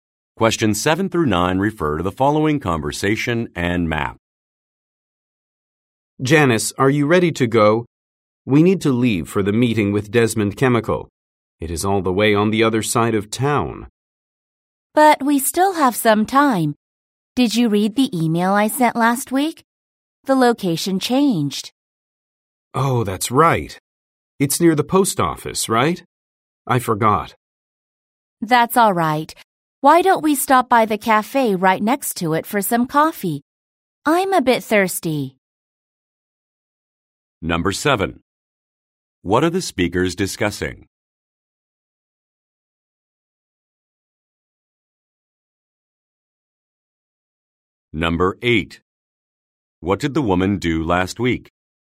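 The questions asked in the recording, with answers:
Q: What are the speakers discussing?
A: Going to a meeting with Desmond Chemical

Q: What did the woman do last week?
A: She sent an email about the changed location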